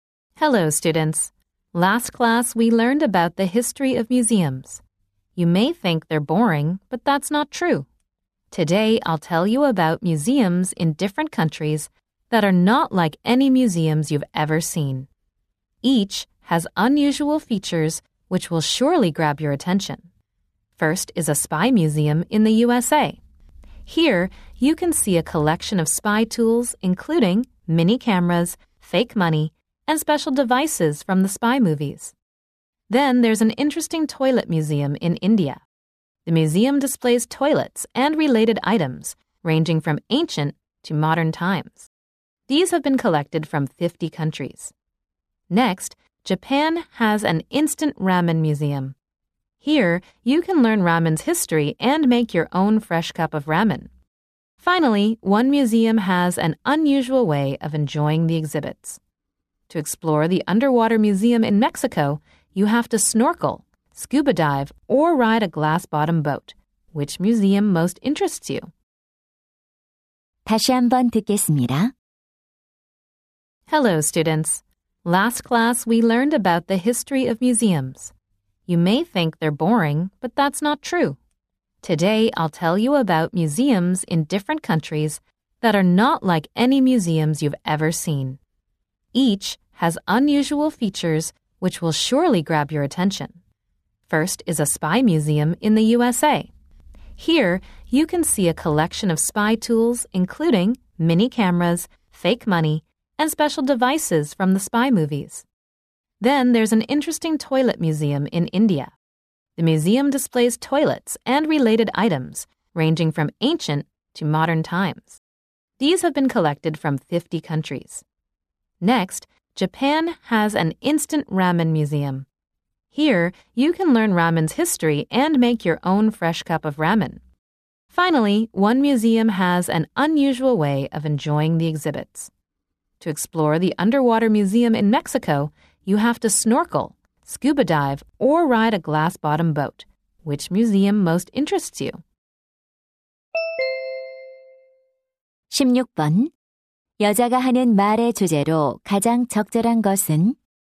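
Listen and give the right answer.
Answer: 여러 나라의 독특한 박물관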